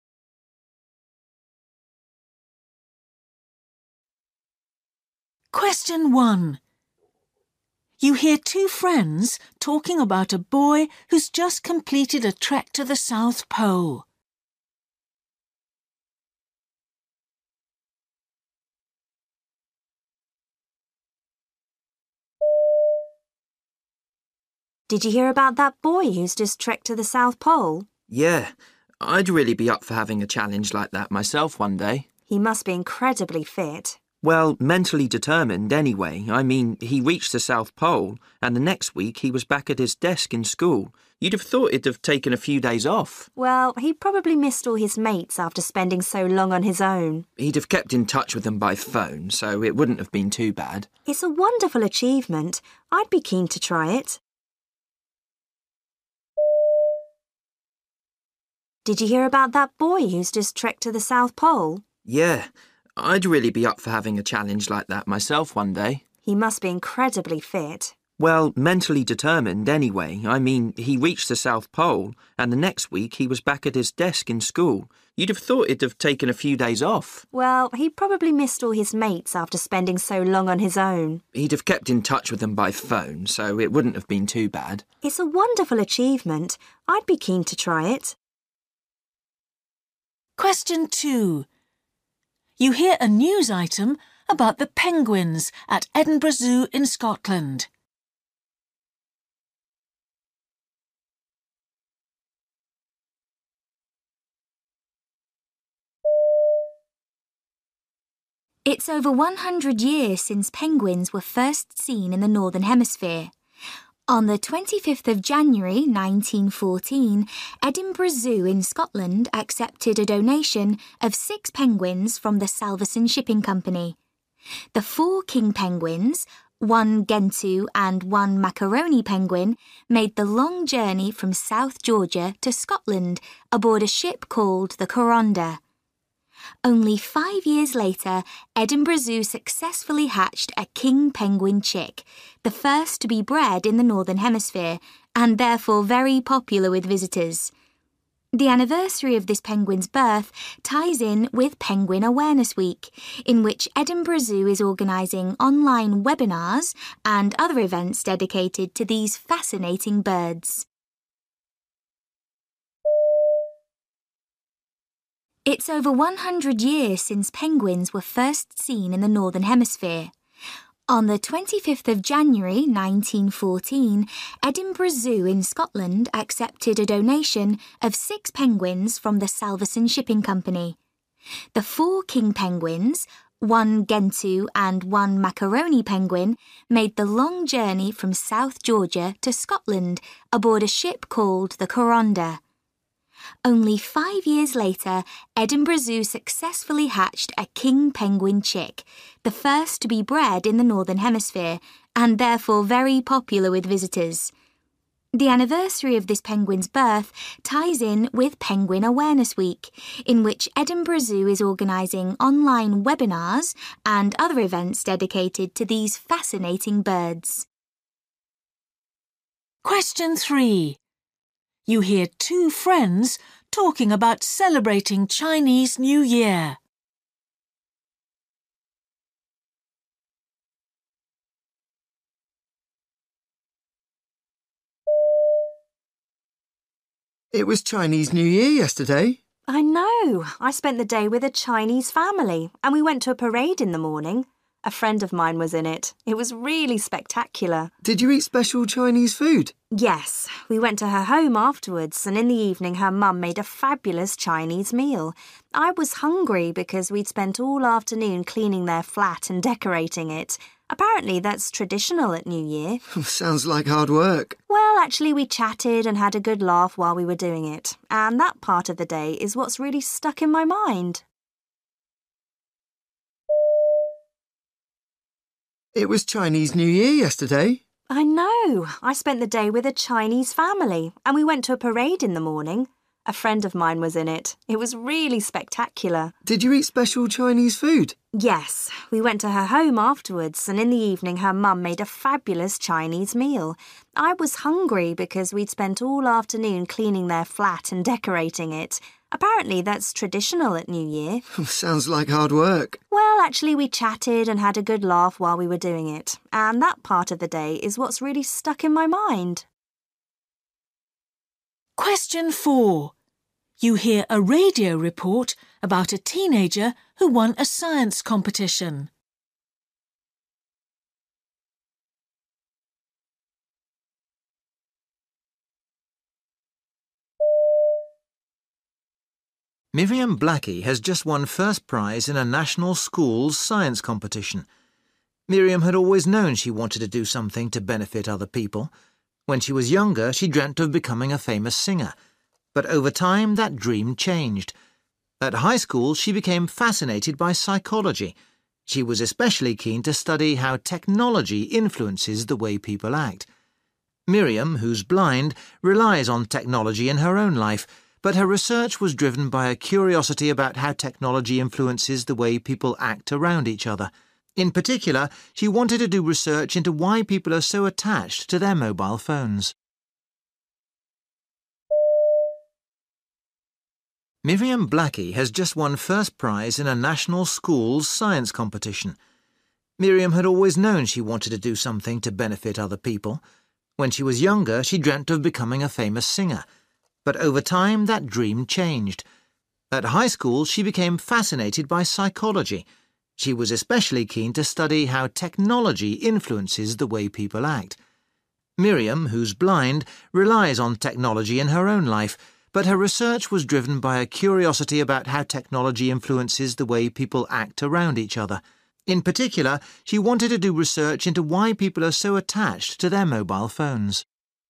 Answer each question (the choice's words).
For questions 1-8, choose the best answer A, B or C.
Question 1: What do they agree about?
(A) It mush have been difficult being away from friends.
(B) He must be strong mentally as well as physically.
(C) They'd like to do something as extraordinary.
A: They'd like to do something as extraordinary.

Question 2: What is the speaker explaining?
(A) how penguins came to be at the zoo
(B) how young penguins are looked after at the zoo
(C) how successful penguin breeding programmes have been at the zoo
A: how penguins came to be at the zoo

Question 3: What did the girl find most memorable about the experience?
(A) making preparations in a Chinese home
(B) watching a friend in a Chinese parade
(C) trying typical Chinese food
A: making preparations in a Chinese home

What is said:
Girl: Did you hear about that boy who's just trekked to the South Pole?
Boy: Yeah, I'd really be up for having a challenge like that myself one day.
Girl: He must be incredibly fit.
Boy: Well, mentally determined anyway. I mean, he reached the South Pole – and the next week he was back at his desk in school. You'd have thought he'd have taken a few days off.
Girl: Well, he probably missed all his mates after spending so long on his own.
Boy: He'd have kept in touch with them by phone. So it wouldn't have been too bad.
Girl: It's a wonderful achievement – I'd be keen to try it!
Reporter: It's over one hundred years since penguins were first seen in the Northern Hemisphere. On the twenty-fifth of January nineteen fourteen, Edinburgh Zoo in Scotland accepted a donation of six penguins from the Salvesen shipping company. The four King penguins, one Gentoo and one Macaroni penguin made the long journey from South Georgia to Scotland aboard a ship called the Coronda.
Only five years later, Edinburgh Zoo successfully hatched a King penguin chick, the first to be bred in the Northern Hemisphere, and therefore very popular with visitors.
The anniversary of this penguin's birth ties in with Penguin Awareness Week in which Edinburgh Zoo is organising online webinars and other events dedicated to these fascinating birds.
3
Boy: It was Chinese New Year yesterday.
Girl: I know. I spent the day with a Chinese family and we went to a parade in the morning. A friend of mine was in it – it was really spectacular!
Boy: Did you eat special Chinese food?
Girl: Yes, we went to her home afterwards and in the evening her mum made a fabulous Chinese meal. I was hungry because we'd spent all afternoon cleaning their flat and decorating it. Apparently that's traditional at New Year.
Boy: Sounds like hard work!
Girl: Well, actually we chatted and had a good laugh while we were doing it, and that part of the day is what's really stuck in my mind.
Reporter: Miriam Blackie has just won first prize in a national schools' science competition. Miriam had always known she wanted to do something to benefit other people. When she was younger, she dreamt of becoming a famous singer. But over time, that dream changed. At high school she became fascinated by psychology. She was especially keen to study how technology influences the was people act. Miriam, who's blind, relies on technology in her own life, but her research was driven by a curiosity about how technology influences the was people act around each other. In particular she wanted to do research into why people are so attached to their mobile phones.